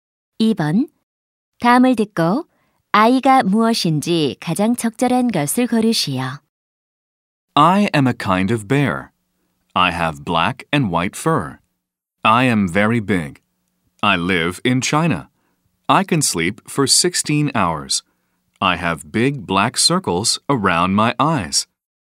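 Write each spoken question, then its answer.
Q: 다음을 듣고 아이가 무엇인지 가장 적절한 것을 고르시오.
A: 판다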